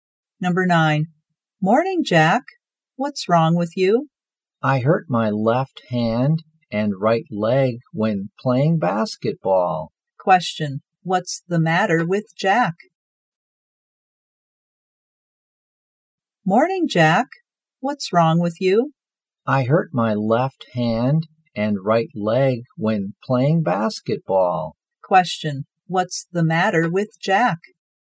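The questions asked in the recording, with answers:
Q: what's the matter with Jack?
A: He hurt his left hand and right leg.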